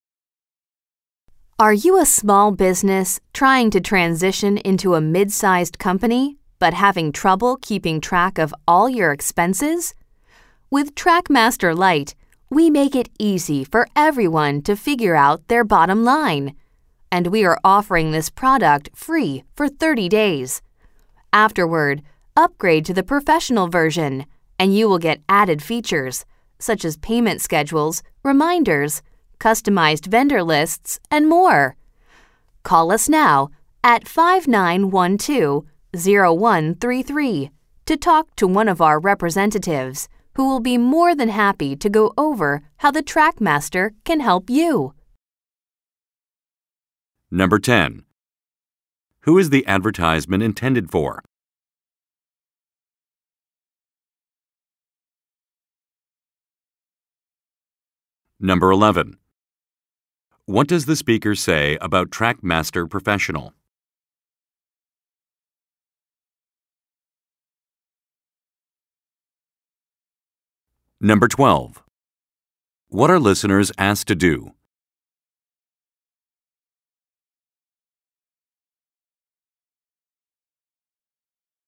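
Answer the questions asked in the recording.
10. Small businesses trying to grow into mid-sized companies
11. It has added features such as payment schedules, reminders and customized vendor lists
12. Call to talk to a representative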